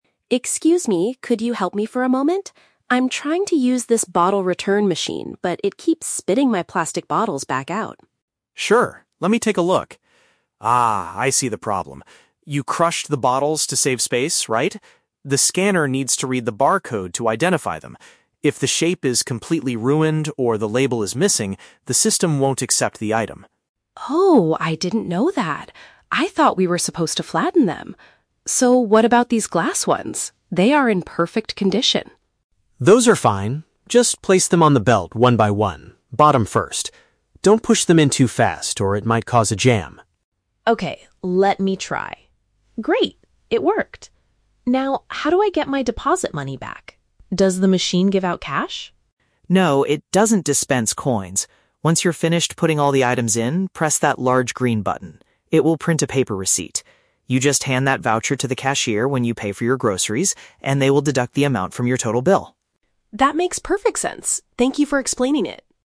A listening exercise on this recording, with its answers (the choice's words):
Listen to the conversation between a customer and a supermarket employee, then choose the correct answer (A, B, or C) for each question.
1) Why did the machine refuse to take the customer's plastic items?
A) Because the printed labels on them were torn off.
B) Because the customer destroyed their original shape.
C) Because the recycling machine was already completely full.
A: Because the customer destroyed their original shape.

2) What does the employee instruct the customer to do with the glass bottles?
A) Insert them into the machine very quickly.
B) Take them directly to the supermarket cashier.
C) Put them on the belt with the base going in first.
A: Put them on the belt with the base going in first.

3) How will the customer receive their refund?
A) The machine will return physical coins to them.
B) They will get a discount on their shopping.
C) The money will be sent straight to their bank account.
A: They will get a discount on their shopping.

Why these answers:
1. The employee says, "You crushed the bottles to save space, right?" Crushing them means destroying their original shape. Option (A) is a trap; the employee mentions "if the label is missing" as a general rule for why a machine might reject a bottle, but the customer's specific problem was that they crushed them. Option (C) is plausible in real life but is never mentioned.
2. The employee tells the customer to place the glass bottles "bottom first." Option (C) uses the synonym "base" for "bottom." Option (A) is a trap; the employee explicitly warns, "Don't push them in too fast." Option (B) is a trap; the customer must take the receipt to the cashier, not the glass bottles.
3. The employee explains that the cashier will "deduct the amount from your total bill" when paying for groceries. Getting an amount deducted from a bill is the same as getting a discount. Option (A) is a trap; the customer asks if the machine gives out cash, but the employee rejects this ("No, it doesn't dispense coins"). Option (C) is not mentioned in the audio.

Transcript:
Customer: Excuse me, could you help me for a moment? I'm trying to use this bottle return machine, but it keeps spitting my plastic bottles back out.
Employee: Sure, let me take a look. Ah, I see the problem. You crushed the bottles to save space, right? The scanner needs to read the barcode to identify them. If the shape is completely ruined or the label is missing, the system won't accept the item.
Customer: Oh, I didn't know that. I thought we were supposed to flatten them. So, what about these glass ones? They are in perfect condition.
Employee: Those are fine. Just place them on the belt one by one, bottom first. Don't push them in too fast, or it might cause a jam.
Customer: Okay, let me try... Great, it worked! Now, how do I get my deposit money back? Does the machine give out cash?
Employee: No, it doesn't dispense coins. Once you're finished putting all the items in, press that large green button. It will print a paper receipt. You just hand that voucher to the cashier when you pay for your groceries, and they will deduct the amount from your total bill.